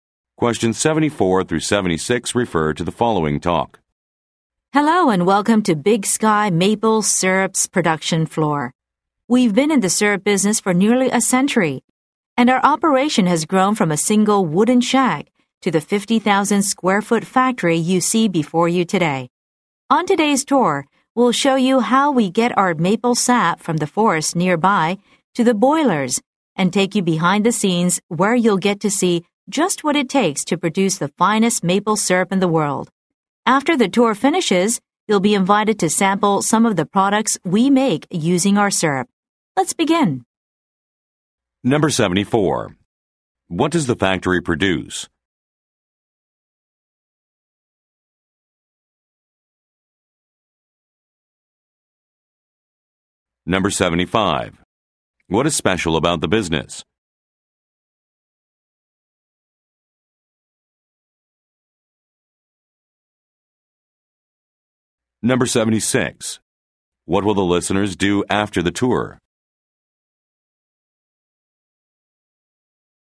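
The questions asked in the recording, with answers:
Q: What does the factory produce?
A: Maple syrup

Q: What is special about the business?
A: It has been in business for nearly a century

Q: What will the listeners do after the tour?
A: Sample products made with the syrup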